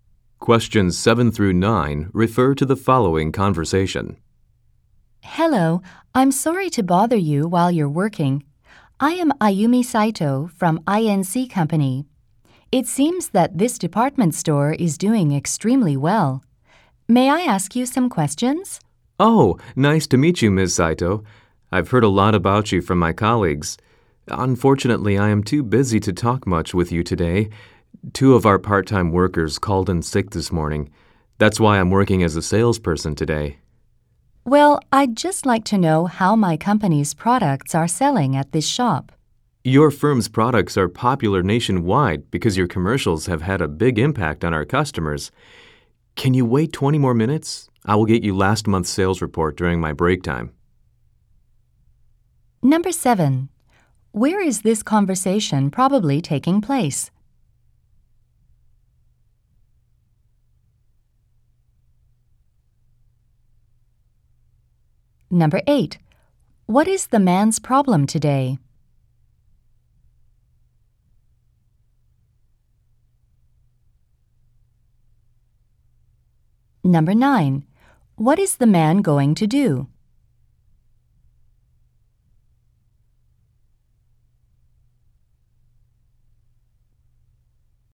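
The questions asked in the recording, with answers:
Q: Where is this conversation probably taking place?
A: At a department store

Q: What is the man's problem today?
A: Two part-time workers called in sick, so he must work as a salesperson and is too busy

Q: What is the man going to do?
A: Get her last month's sales report during his break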